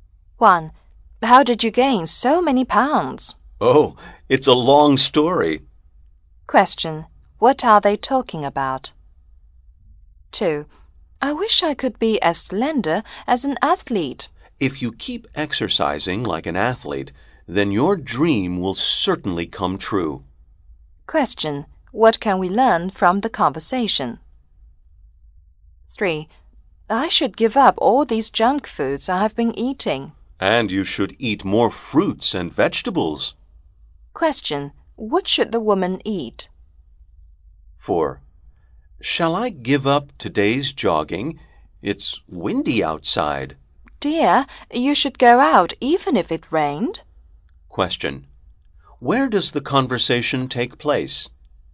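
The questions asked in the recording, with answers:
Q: What are they talking about?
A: Gaining weight

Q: What should the woman eat?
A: More fruits and vegetables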